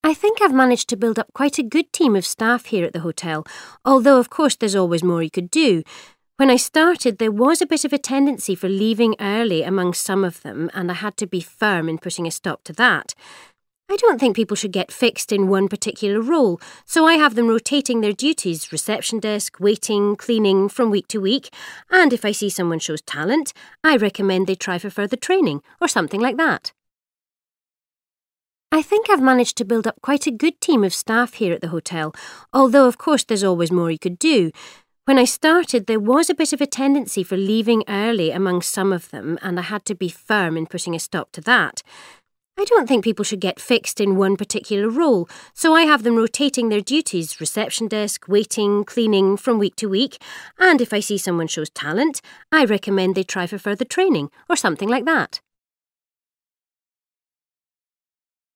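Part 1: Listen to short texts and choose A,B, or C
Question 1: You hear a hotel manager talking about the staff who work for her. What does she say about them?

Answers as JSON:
{"1": "She has them rotate their duties from week to week."}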